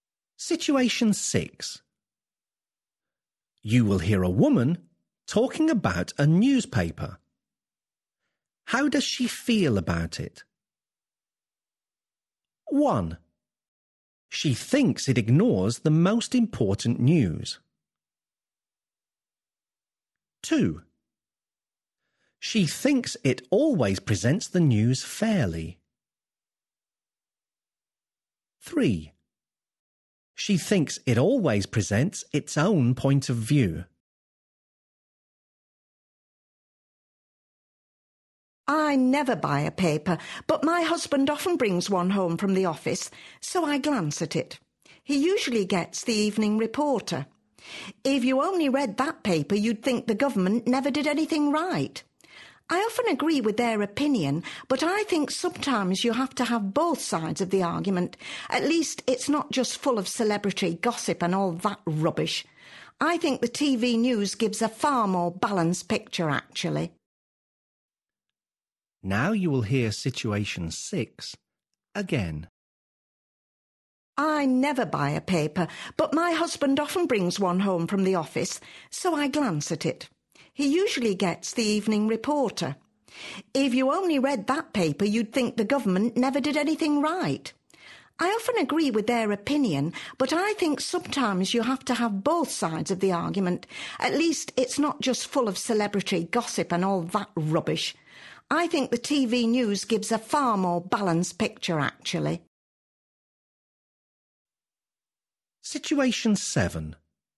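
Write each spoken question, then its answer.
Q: How does she feel about it?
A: 3: She thinks it always presents its own point of view.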